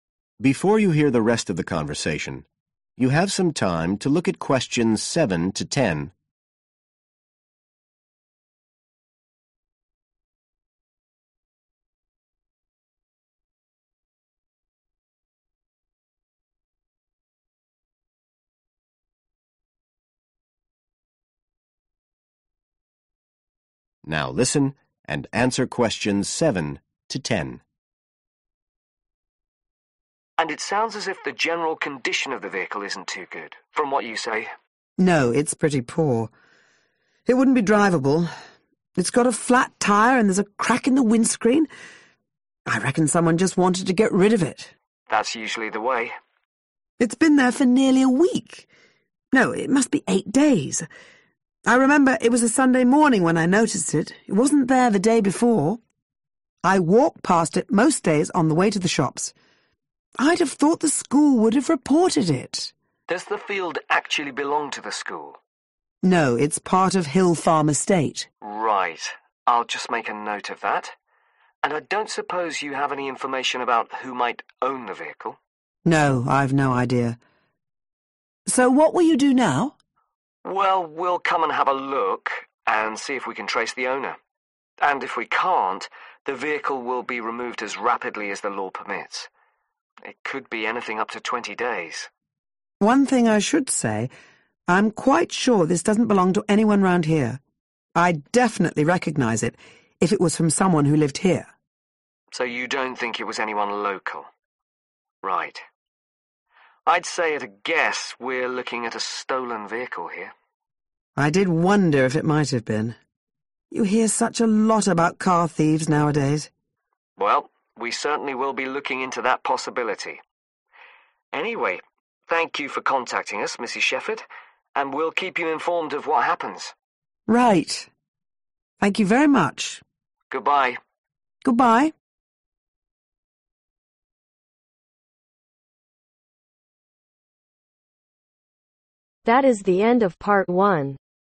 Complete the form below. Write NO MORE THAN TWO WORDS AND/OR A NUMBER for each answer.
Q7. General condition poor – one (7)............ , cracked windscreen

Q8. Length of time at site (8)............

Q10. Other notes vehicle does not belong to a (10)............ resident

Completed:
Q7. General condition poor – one Flat Tyre/Tire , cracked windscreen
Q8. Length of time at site 8/Eight days
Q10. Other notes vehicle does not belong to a Local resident